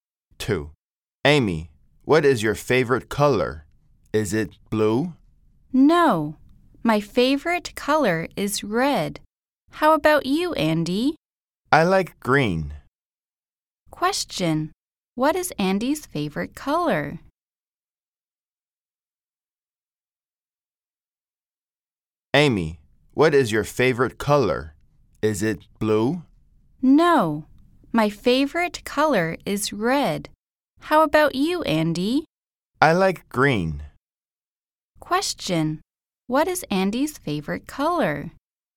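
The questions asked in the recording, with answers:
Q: Question, what is Andy's favorite color?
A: Green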